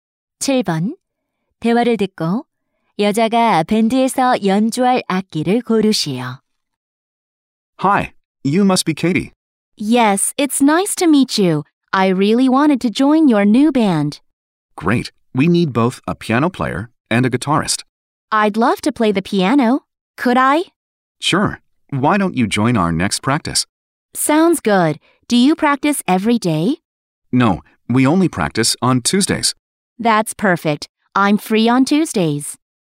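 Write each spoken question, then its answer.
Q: 대화를 듣고 여자가 밴드에서 연주할 악기를 고르시오.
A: 피아노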